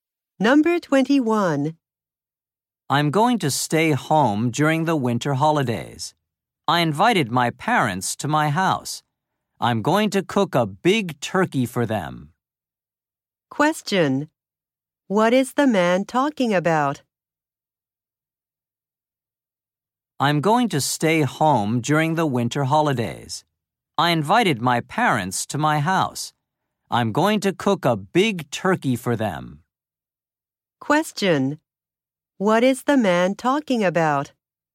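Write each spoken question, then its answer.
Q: What is the man talking about?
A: His plans for the winter holidays.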